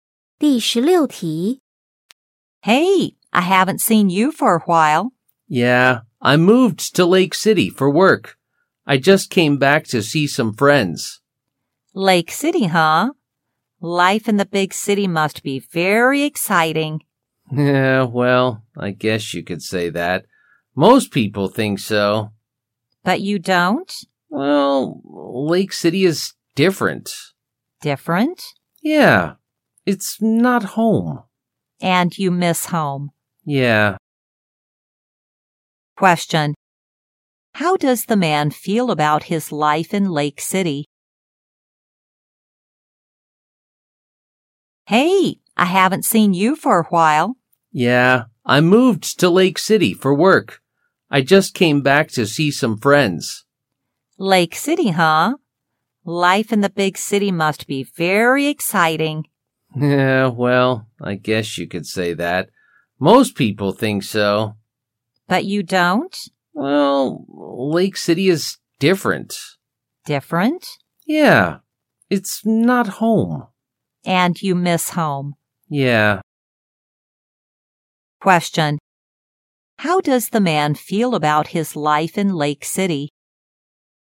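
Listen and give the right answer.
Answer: He is not happy there; he misses home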